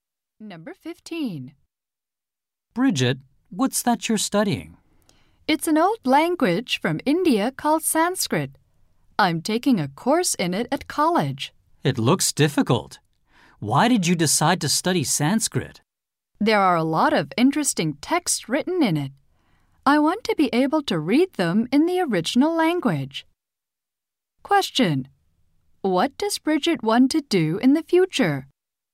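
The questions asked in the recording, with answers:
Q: What does Bridget want to do in the future?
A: Read Sanskrit texts in the original language.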